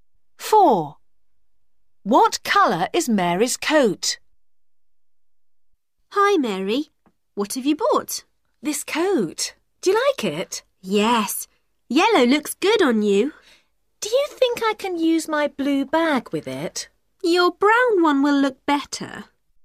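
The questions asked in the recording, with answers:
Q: What colour is Mary's coat?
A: Yellow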